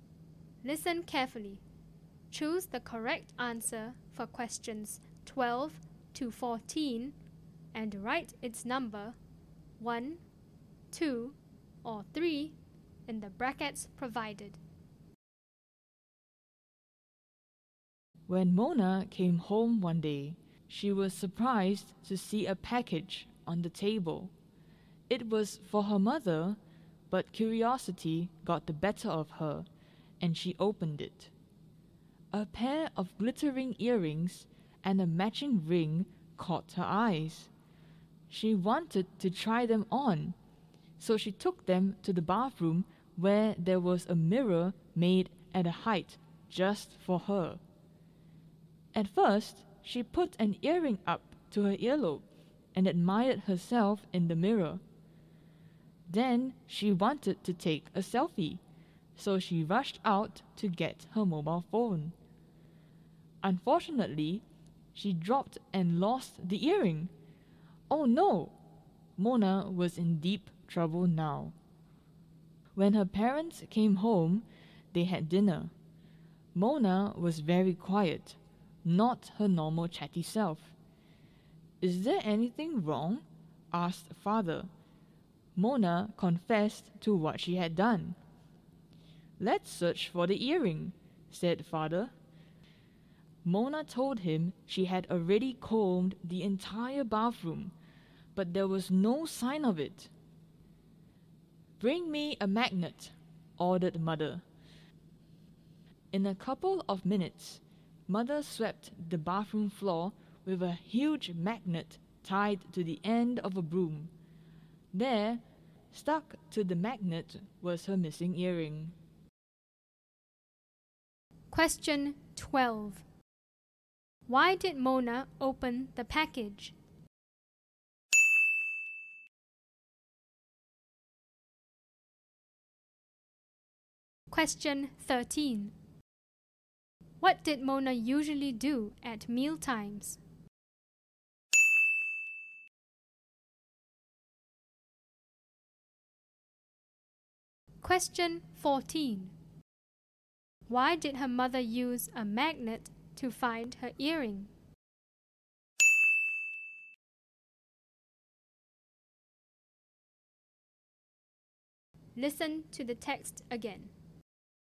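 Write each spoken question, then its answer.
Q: Why did Mona open the package?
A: She was curious.

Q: What did Mona usually do at mealtimes?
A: She chatted a lot.

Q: Why did her mother use a magnet to find her earring?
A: The earring was made of metal, so the magnet would attract it.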